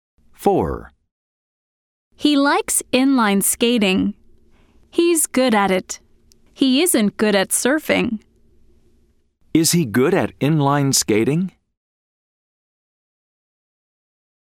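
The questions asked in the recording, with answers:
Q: Is he good at inline skating?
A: Yes, he is.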